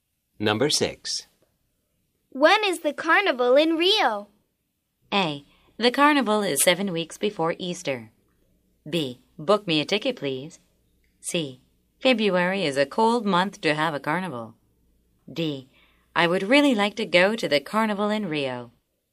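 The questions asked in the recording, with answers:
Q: When is the carnival in Rio?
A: A: The carnival is 7 weeks before Easter.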